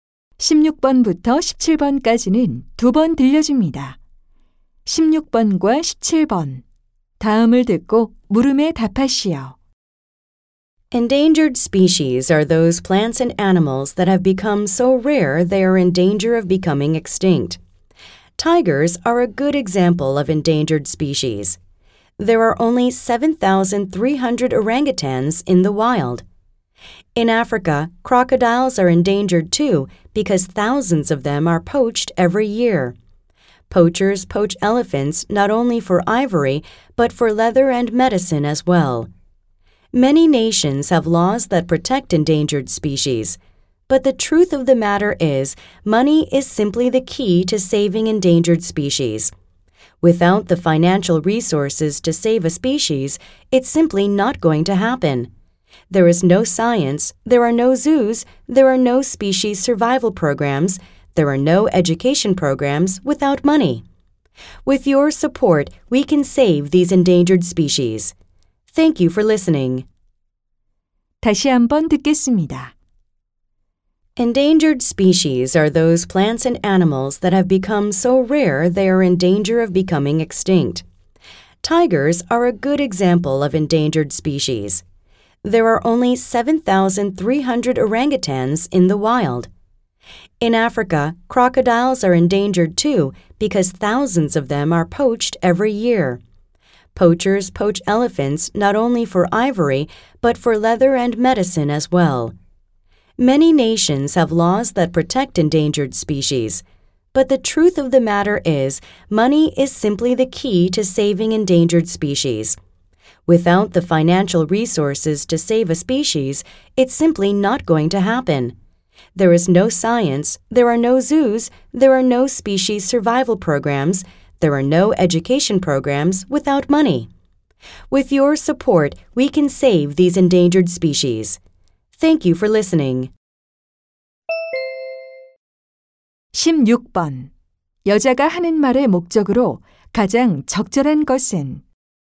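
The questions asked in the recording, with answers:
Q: 여자가 하는 말의 목적으로 가장 적절한 것은?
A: 멸종 위기종 보호를 위한 재정적 후원을 요청하려고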